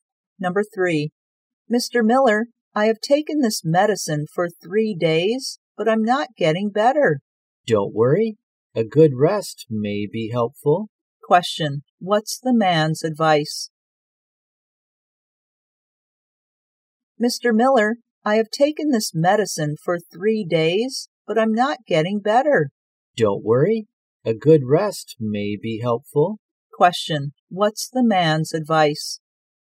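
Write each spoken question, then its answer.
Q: Question, what's the man's advice?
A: Have a good rest.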